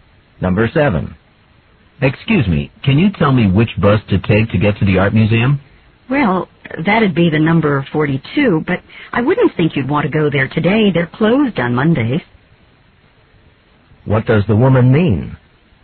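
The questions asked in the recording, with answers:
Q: What does the woman mean?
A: The museum is closed today (Monday).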